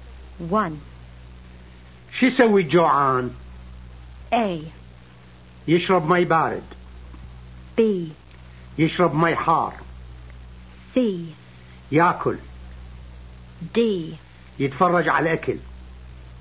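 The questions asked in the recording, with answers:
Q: شو يسوي جوعان؟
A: C: ياكل.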